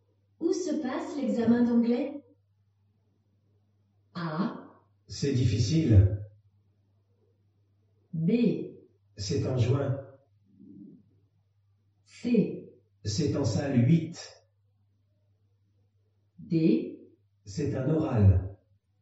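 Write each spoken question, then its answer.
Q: Où se passe l'examen d'anglais?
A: C: C'est en salle 8.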